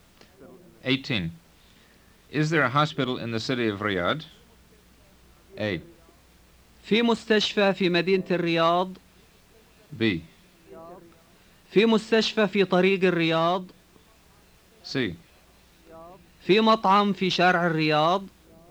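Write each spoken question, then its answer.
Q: Is there a hospital in the city of Riyadh?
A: A: في مستشفى في مدينة الرياض.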